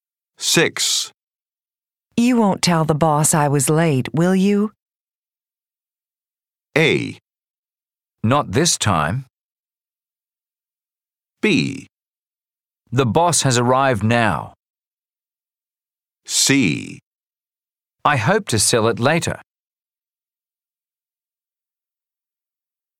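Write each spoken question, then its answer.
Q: You won't tell the boss I was late, will you?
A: A: Not this time.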